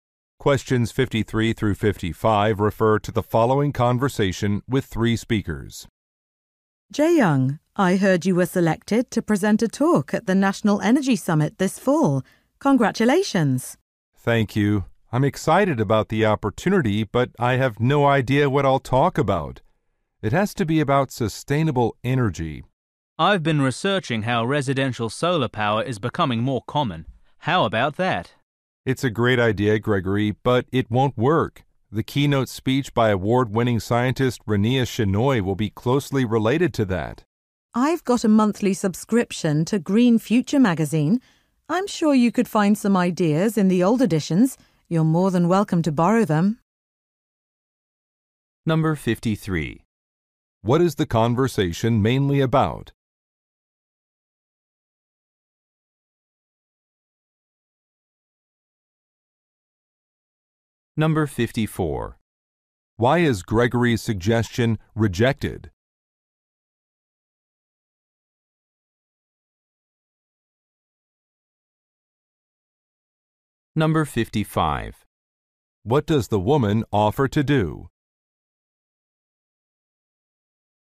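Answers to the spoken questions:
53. Choosing a topic for a talk at an energy summit
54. The keynote speech will cover a closely related topic
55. Lend her old copies of Green Future magazine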